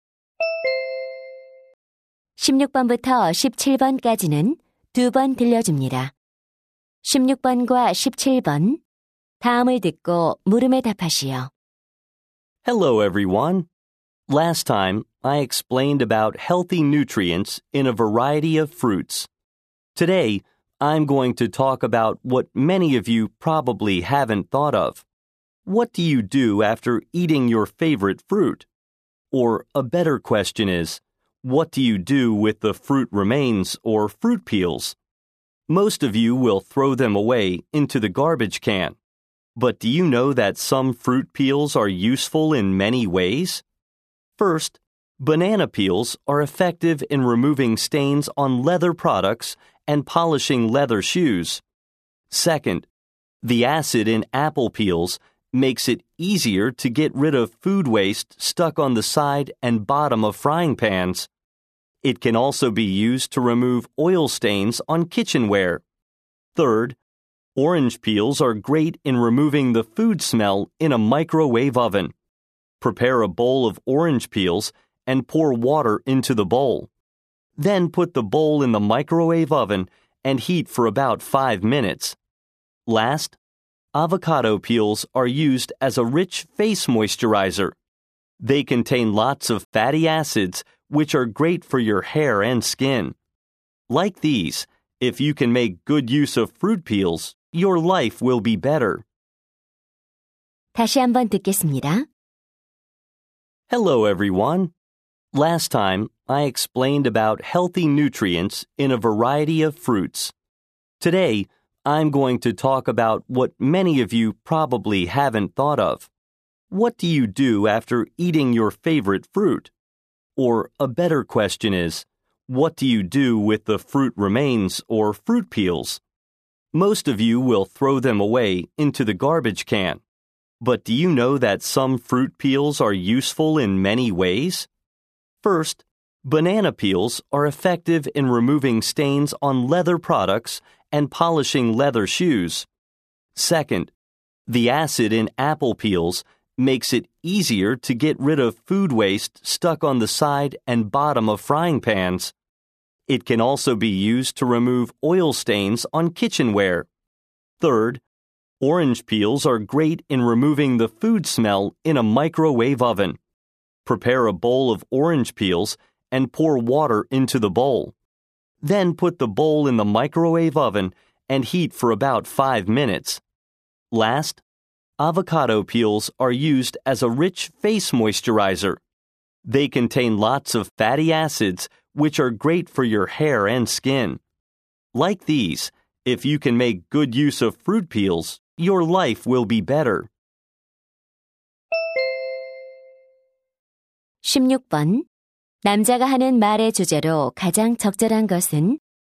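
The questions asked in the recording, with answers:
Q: 남자가 하는 말의 주제로 가장 적절한 것은?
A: 과일 껍질의 다양한 활용법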